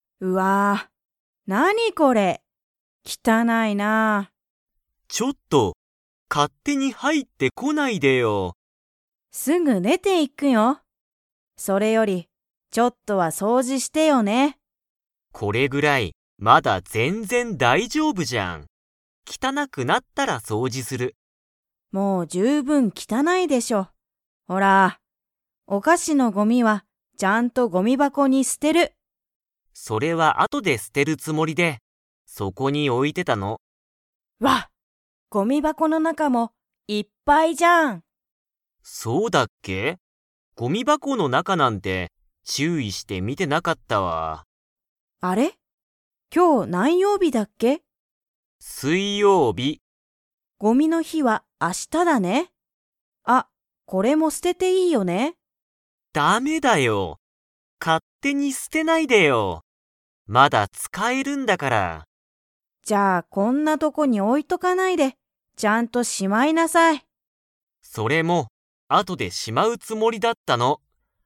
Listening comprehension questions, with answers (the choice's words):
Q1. タカシは、ごみ箱ばこの中なかを注意ちゅういして 。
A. 見みてた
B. 見みてなかった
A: 見みてなかった

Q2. ごみの日ひは何曜日なんようびですか?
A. 火曜日かようび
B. 水曜日すいようび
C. 木曜日もくようび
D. 金曜日きんようび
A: 木曜日もくようび

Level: Level 4